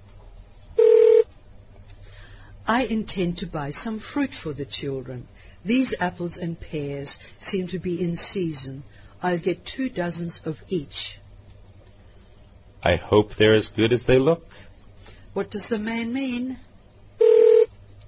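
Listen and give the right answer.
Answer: He will buy two dozen apples and two dozen pears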